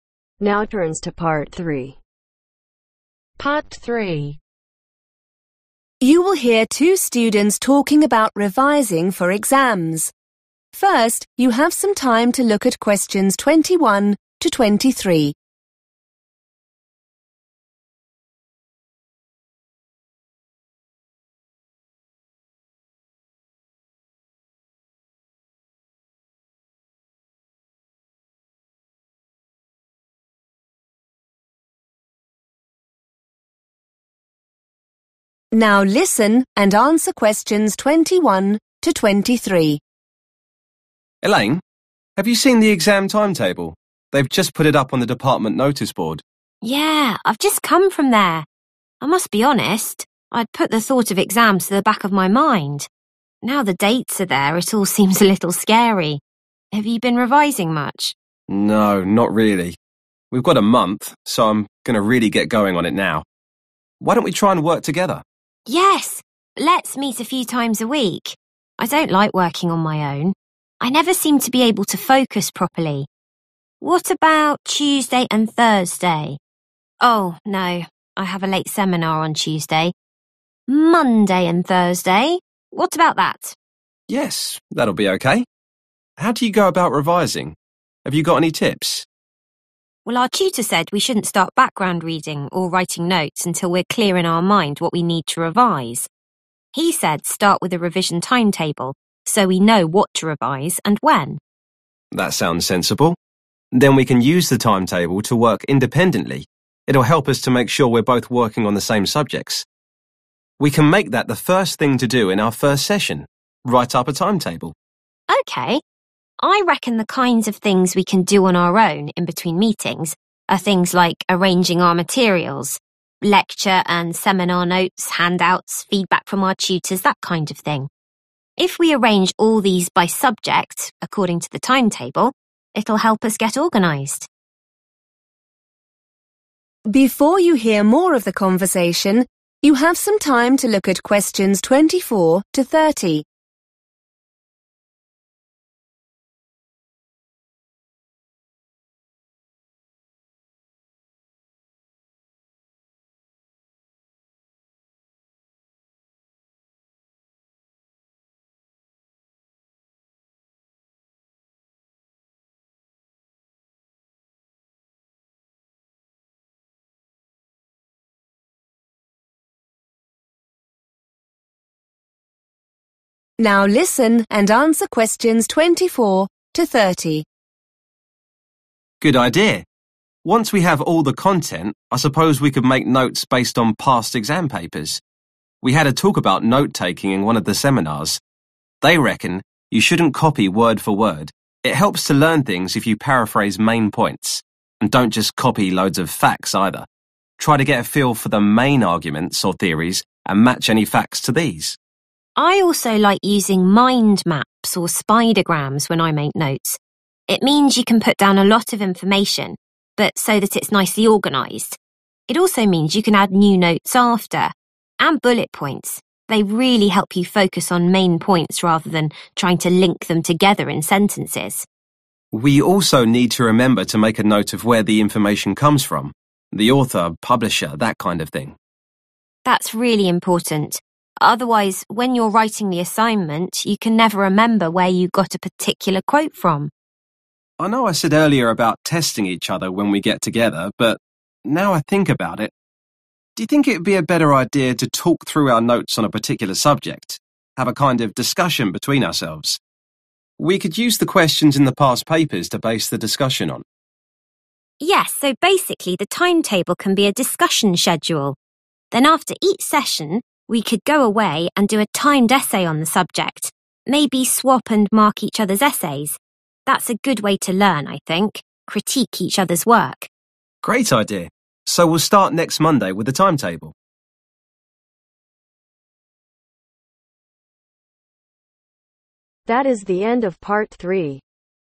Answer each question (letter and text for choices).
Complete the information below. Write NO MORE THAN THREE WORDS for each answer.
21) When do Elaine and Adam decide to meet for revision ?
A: Monday and Thursday

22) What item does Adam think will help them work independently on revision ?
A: (a) Revision Timetable

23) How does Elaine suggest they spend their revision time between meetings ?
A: Arranging (their) materials

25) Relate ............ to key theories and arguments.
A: Facts

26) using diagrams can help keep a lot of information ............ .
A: (Nicely) Organized

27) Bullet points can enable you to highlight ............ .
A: Key Points

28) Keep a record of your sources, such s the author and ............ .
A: Publisher

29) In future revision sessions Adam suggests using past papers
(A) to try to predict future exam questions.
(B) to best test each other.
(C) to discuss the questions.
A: (C) to discuss the questions.

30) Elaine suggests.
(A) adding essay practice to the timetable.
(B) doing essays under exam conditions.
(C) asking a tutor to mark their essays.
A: (B) doing essays under exam conditions.